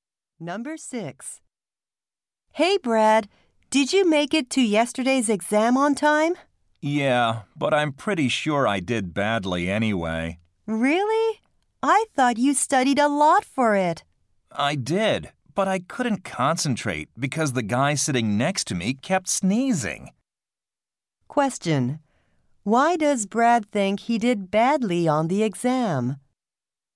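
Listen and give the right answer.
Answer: The person next to him kept sneezing, so he couldn't concentrate.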